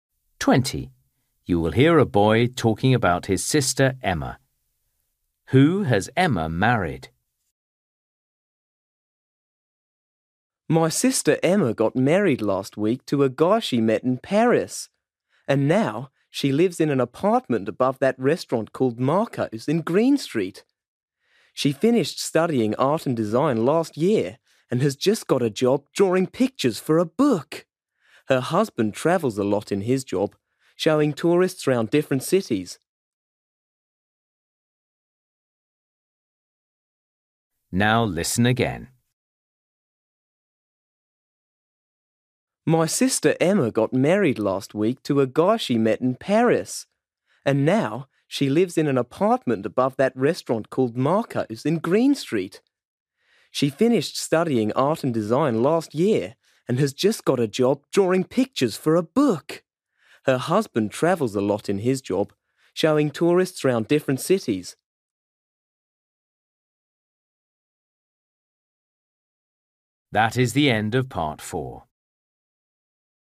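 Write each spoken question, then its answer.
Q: Who has Emma married?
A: a tour guide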